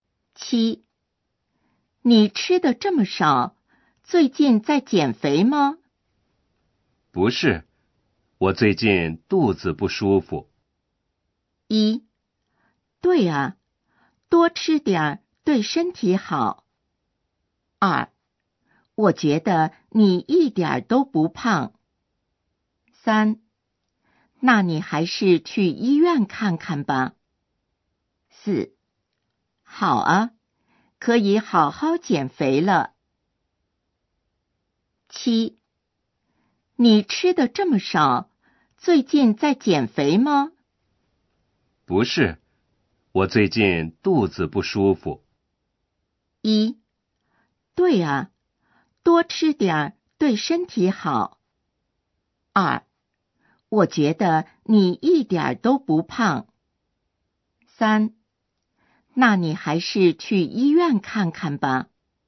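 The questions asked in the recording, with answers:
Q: 不是,我最近肚子不舒服。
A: 三: 那你还是去医院看看吧。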